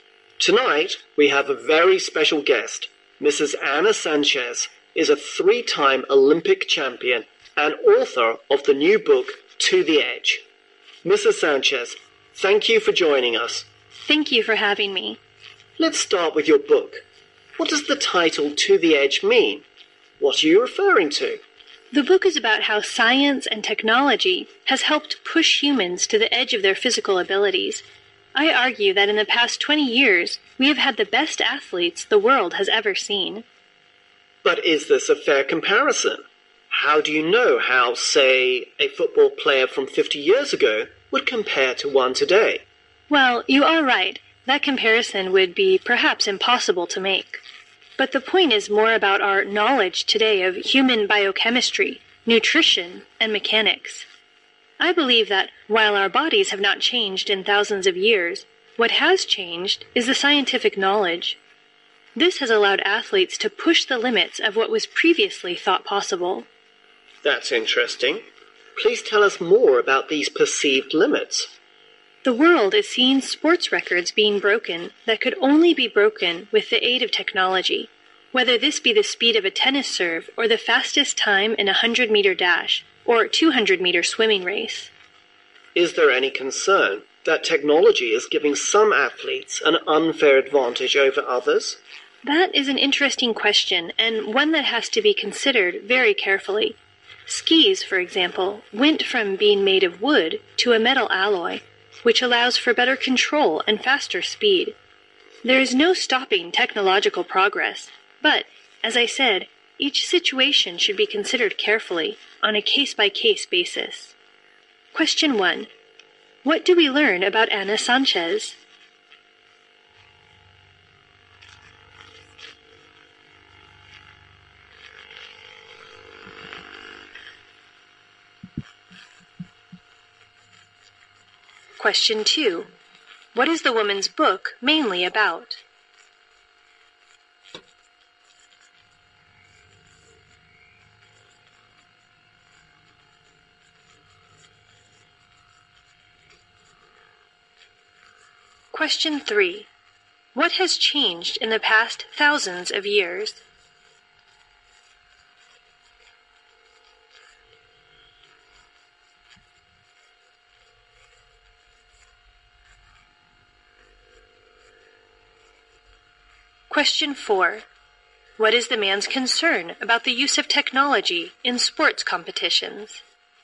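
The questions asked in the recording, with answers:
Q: What do we learn about Anna Sanchez?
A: She is a three-time Olympic champion and author of the new book To the Edge.

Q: What is the woman's book mainly about?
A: How science and technology have helped push humans to the edge of their physical abilities.

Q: What has changed in the past thousands of years?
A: Scientific knowledge (not human bodies).

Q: What is the man's concern about the use of technology in sports competitions?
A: That it may give some athletes an unfair advantage over others.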